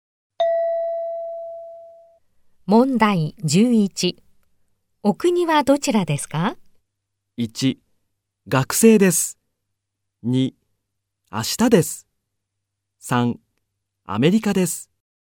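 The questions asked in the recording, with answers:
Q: お国はどちらですか?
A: 3: アメリカです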